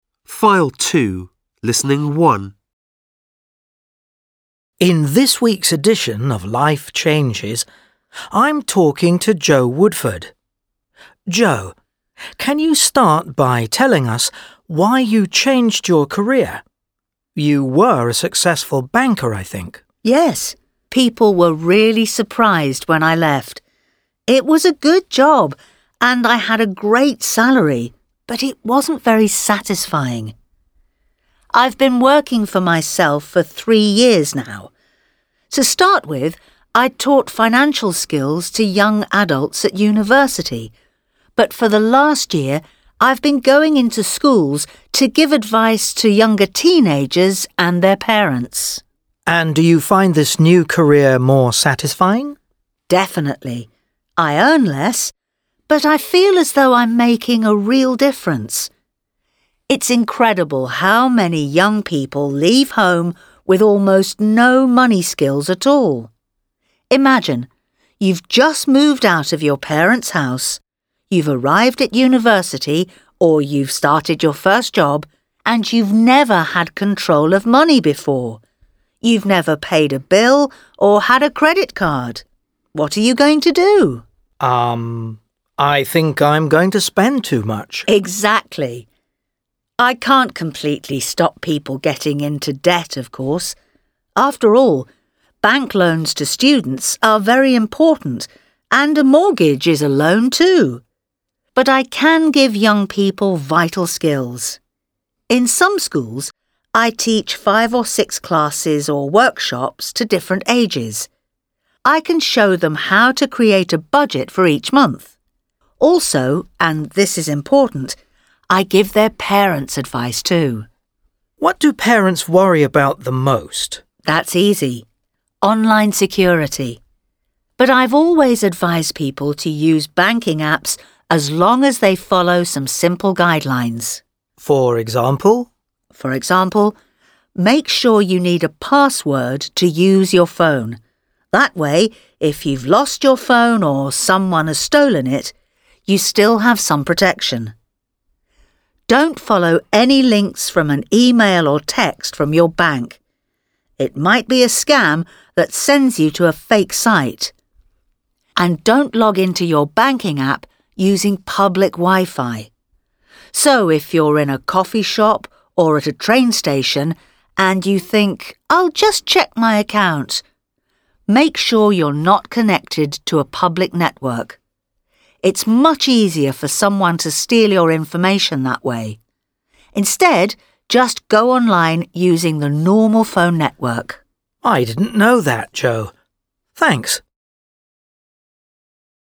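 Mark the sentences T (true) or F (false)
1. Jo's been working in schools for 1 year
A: T

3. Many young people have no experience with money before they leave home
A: T

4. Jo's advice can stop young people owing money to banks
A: F

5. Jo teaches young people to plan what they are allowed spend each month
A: T

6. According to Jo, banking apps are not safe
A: F

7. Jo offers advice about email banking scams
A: T

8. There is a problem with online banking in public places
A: T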